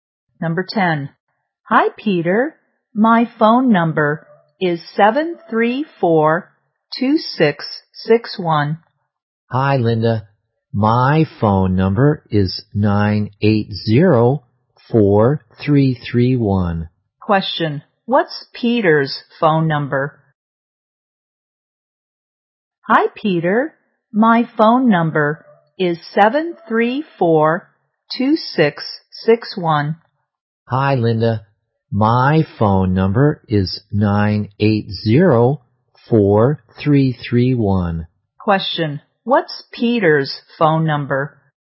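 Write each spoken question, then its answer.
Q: What's Peter's phone number?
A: 734-2661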